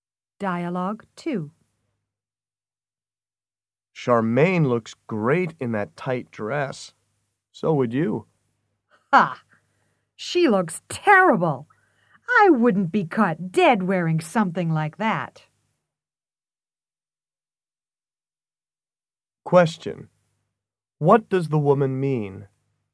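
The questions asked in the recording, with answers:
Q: What does the woman mean?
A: She thinks Charmaine looks terrible and would never wear a dress like that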